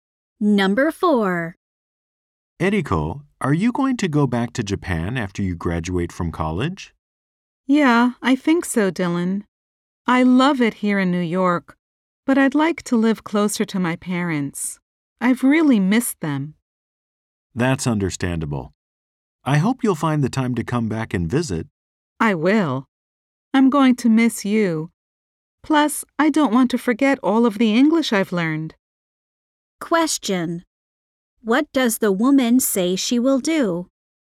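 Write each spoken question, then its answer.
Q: What does the woman say she will do?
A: Go back to Japan after graduating to live closer to her parents.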